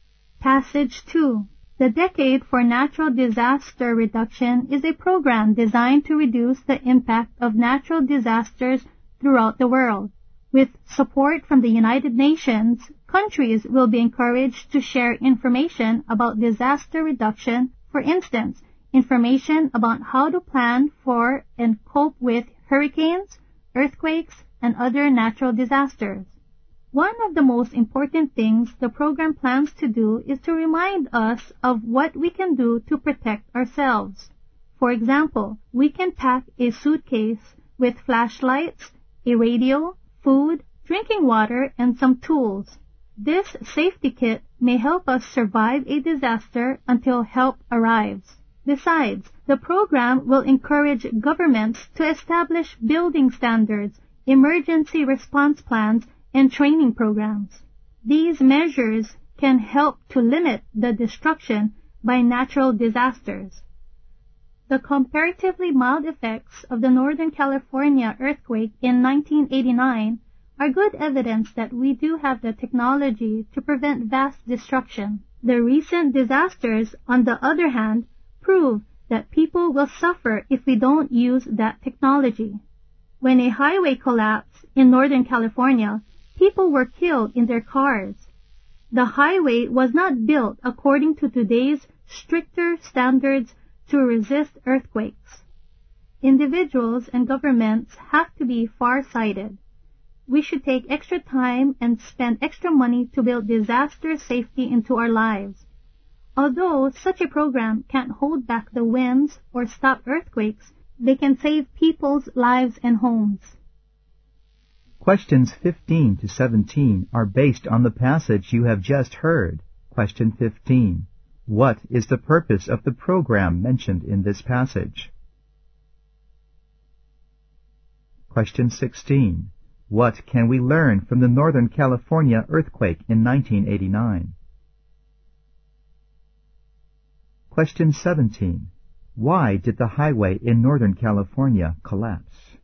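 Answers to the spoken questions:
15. To reduce the impact of natural disasters
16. We have the technology to prevent vast destruction
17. It was not built to today's stricter earthquake standards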